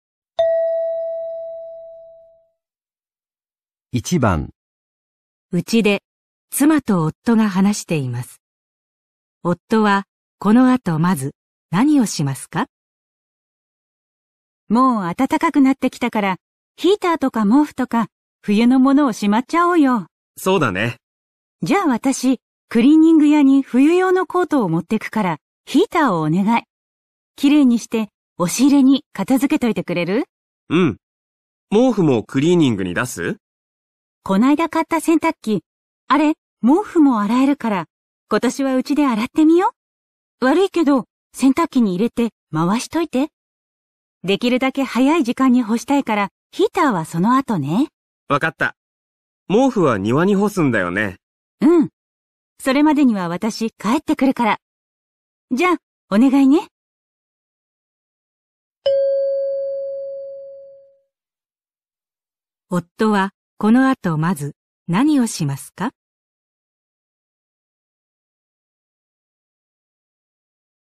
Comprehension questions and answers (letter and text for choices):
問題1 では、まず質問を聞いてください。それから話を聞いて、用紙の1から4の中から、最もよいものを一つ選んでください。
夫はこのあとまず何をしますか。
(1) ヒーターを掃除する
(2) 毛布を洗濯機にいれる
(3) クリーニング屋にコートを持っていく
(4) 毛布を庭に干す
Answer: (2) 毛布を洗濯機にいれる

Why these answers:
原文是妻子说因为已经变暖,想要将冬天的电热器,毛毯等收拾起来,女的去把冬天的外套送去干洗,让男的先洗毛毯,再收拾电热器。正确答案为2先把毛毯放入洗衣机。

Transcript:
うちで妻と夫が話しています。
妻:もう暖かくなってきたから、ヒーターとか毛布とか、冬のものをしまっちゃおうよ。
夫:そうだね。
妻:じゃ、私クリーニング屋に冬用のコートを持っていくから、ヒーターをお願い。
きれいにして押し入れに片付けといてくれる。
夫:うん。毛布もクリーニングに出す。
妻:この間買った洗濯機、あれ毛布も洗えるから、今年はうちで洗ってみよう。
悪いけど、洗濯機に入れて回しといて、できるだけ早い時間に干したいから、ヒーターはそのあとね。
夫:わかった。毛布は庭に干すんだよね。
妻:うん、それまでには私帰ってくるから、じゃ、お願いね。

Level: N3